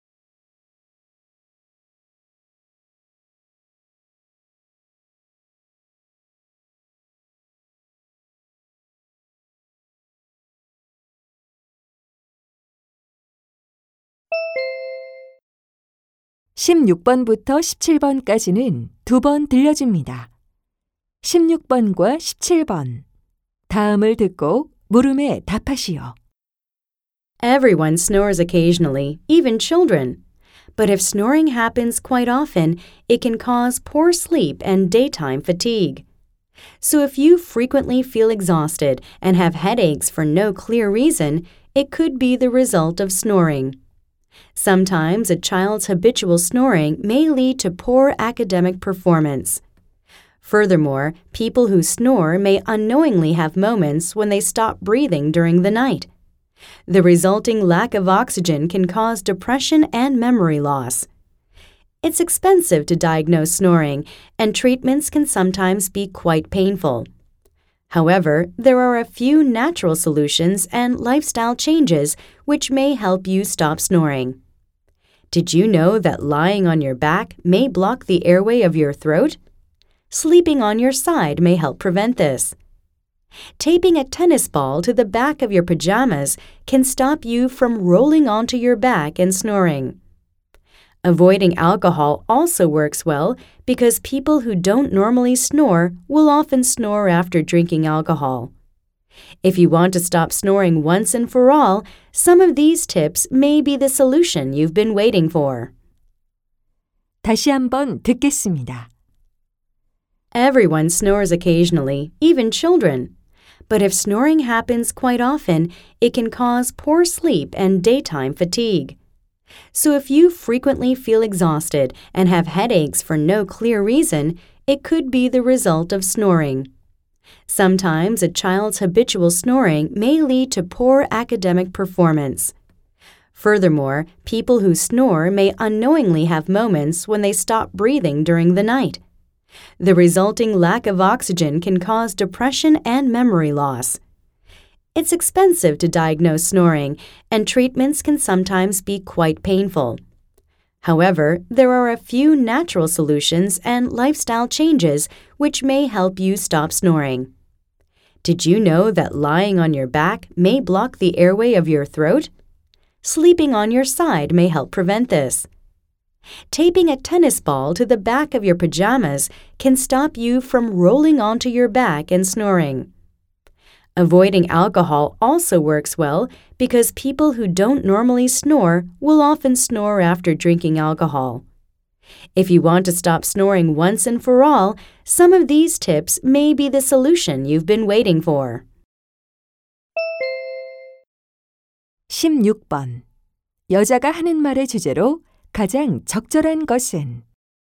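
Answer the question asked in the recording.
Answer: The negative effects of snoring and natural ways to stop it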